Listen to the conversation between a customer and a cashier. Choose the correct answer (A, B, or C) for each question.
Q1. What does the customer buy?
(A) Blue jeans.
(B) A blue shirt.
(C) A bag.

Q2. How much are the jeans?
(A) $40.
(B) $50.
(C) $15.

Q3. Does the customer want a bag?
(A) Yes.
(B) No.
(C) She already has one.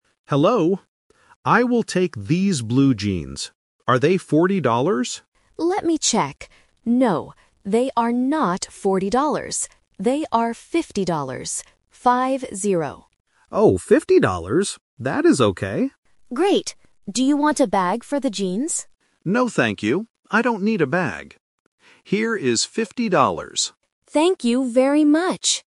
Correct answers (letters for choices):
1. A
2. B
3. B

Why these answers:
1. The customer says in the first sentence, "I will take these blue jeans." Option C (A bag) is the trap because the cashier mentions a bag later, but it is not the main item the customer buys. Option B is not mentioned.
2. The cashier clearly corrects the price: "They are fifty dollars. Five-zero." The customer also repeats "fifty dollars" twice. Option A ($40) is the trap because the customer guesses this price first. Option C ($15) is a phonetic trap because "fifteen" sounds similar to "fifty" for A1 learners.
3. When the cashier asks, "Do you want a bag?", the customer explicitly answers, "No, thank you. I don't need a bag." Option A is the opposite of the truth. Option C is not mentioned in the audio.

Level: A1